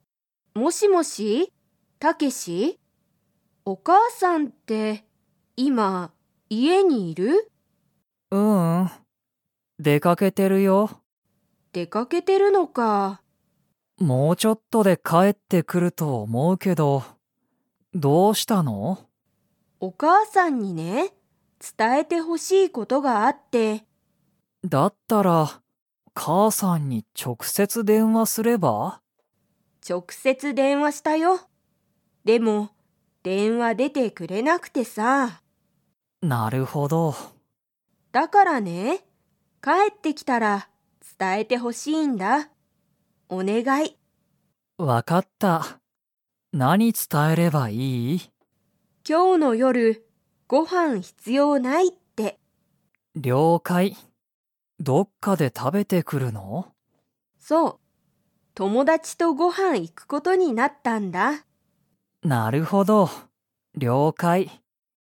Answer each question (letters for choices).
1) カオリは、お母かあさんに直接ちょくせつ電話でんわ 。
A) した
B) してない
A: A

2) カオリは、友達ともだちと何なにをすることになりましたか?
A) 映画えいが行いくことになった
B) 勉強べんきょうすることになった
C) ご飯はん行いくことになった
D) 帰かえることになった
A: C

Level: Level 3